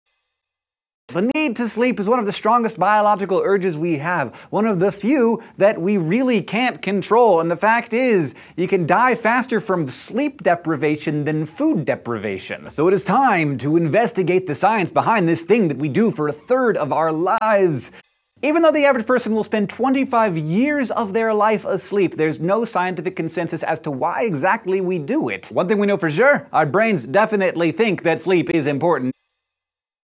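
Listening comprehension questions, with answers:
Fill the gaps in the transcript below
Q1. The need to sleep is one of the strongest _____ _____ we have, one of the few that we really can't control; and the fact is, you can die faster from _____ _____ than _____ _____.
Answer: biological urges; sleep deprivation; food deprivation

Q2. So it is time to investigate the science behind this thing that we do for a _____ of our lives.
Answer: third

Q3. Even though the _____ _____ will spend 25 years of their life asleep, there's no scientific _____ as to why exactly we do it.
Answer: average person; consensus

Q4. One thing we know for sure: our _____ definitely think that sleep is important.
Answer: brains

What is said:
The need to sleep is one of the strongest biological urges we have, one of the few that we really can't control; and the fact is, you can die faster from sleep deprivation than food deprivation. 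So it is time to investigate the science behind this thing that we do for a third of our lives. Even though the average person will spend 25 years of their life asleep, there's no scientific consensus as to why exactly we do it. One thing we know for sure: our brains definitely think that sleep is important.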